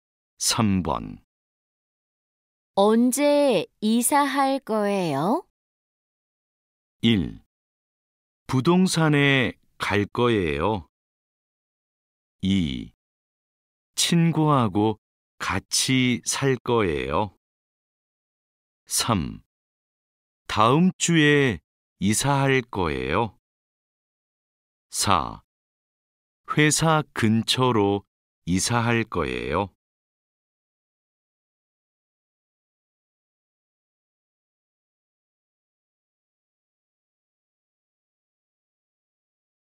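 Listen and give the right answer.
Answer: 3: 다음 주에 이사할 거예요.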